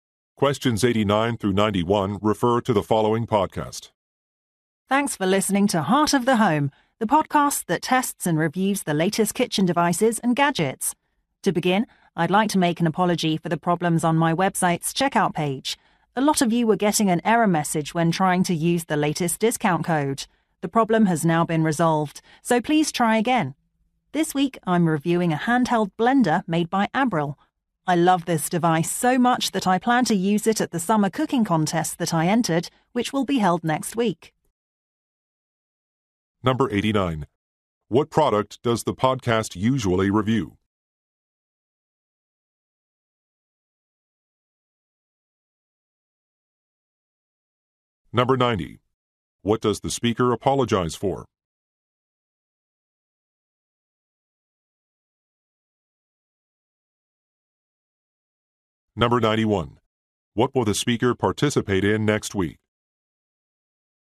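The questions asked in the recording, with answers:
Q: What product does the podcast usually review?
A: Kitchen devices and gadgets

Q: What does the speaker apologize for?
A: Problems on the website's checkout page

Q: What will the speaker participate in next week?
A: A summer cooking contest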